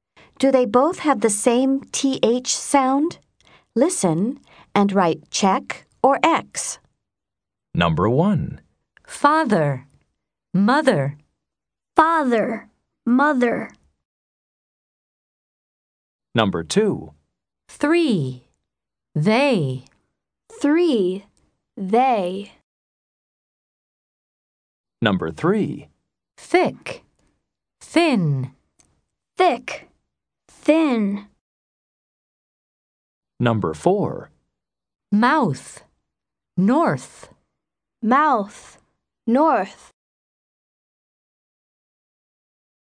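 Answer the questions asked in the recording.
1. Check (same TH sound)
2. X (different TH sounds)
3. Check (same TH sound)
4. Check (same TH sound)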